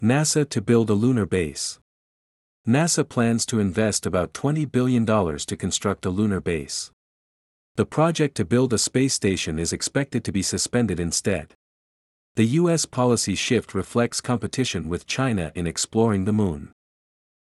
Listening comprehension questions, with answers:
次の各英文の内容が本文の説明と合っていたら"True"、違っていたら"False" を選んでください。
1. The US project to build a space station was completely cancelled.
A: False

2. The United States is competing with China in exploring the Moon.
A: True

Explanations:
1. 2番目のセンテンスで、「代わりに、宇宙ステーションを建設する計画は中断される見通しである。」と述べています。今後、再開の見込みがゼロという意味ではないので、解答はFalse となります。
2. 3番目のセンテンスで、「アメリカの政策転換は、月の探査をめぐる中国との競争を反映している。」と述べています。設問の内容と一致するため、解答はTrue となります。

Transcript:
NASA to Build a Lunar Base
NASA plans to invest about 20 billion dollars to construct a lunar base.
The project to build a space station is expected to be suspended instead.
The US policy shift reflects competition with China in exploring the Moon.